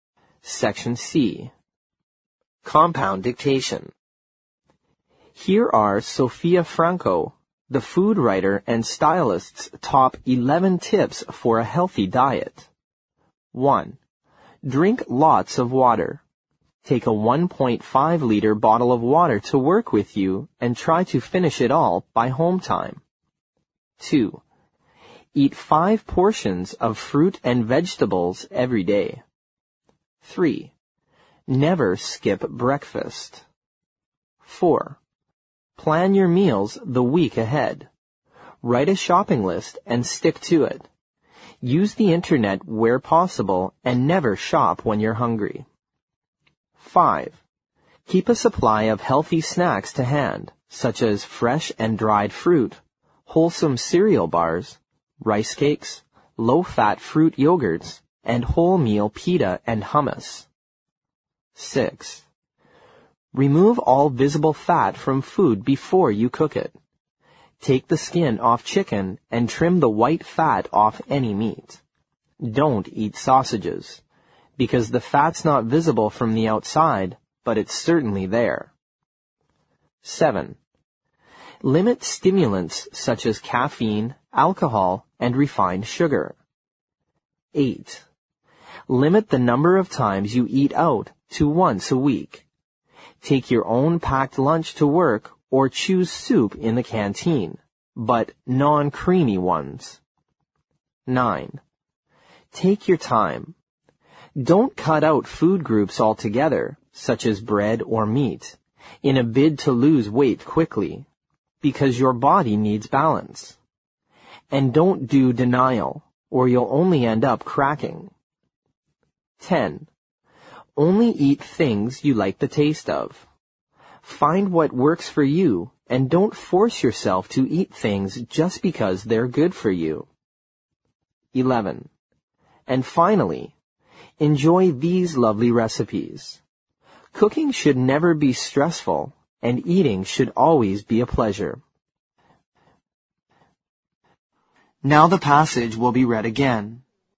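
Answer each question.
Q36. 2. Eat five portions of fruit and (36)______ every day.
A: vegetables

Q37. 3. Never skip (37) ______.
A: breakfast

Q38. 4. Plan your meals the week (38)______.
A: ahead

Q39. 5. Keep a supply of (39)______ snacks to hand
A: healthy

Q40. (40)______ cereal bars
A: wholesome

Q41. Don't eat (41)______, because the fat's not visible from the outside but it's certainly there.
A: sausages

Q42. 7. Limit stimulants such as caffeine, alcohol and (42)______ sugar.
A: refined

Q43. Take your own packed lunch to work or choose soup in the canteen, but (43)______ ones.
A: non-creamy

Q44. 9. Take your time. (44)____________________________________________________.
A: Don't cut out food groups altogether, such as bread or meat, in a bid to lose weight quickly, because your body needs balance

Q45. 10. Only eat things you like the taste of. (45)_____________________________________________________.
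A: Find what works for you, and don't force yourself to eat things just because they're good for you

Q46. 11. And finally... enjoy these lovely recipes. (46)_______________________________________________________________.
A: Cooking should never be stressful, and eating should always be a pleasure

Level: 六级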